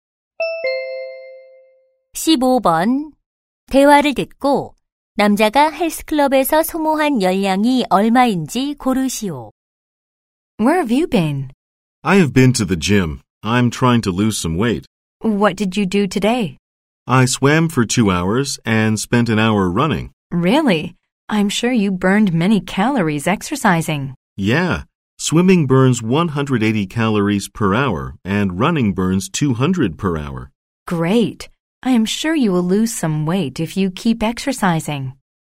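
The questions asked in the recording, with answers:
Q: 대화를 듣고 남자가 헬스클럽에서 소모한 열량이 얼마인지 고르시오.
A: 560칼로리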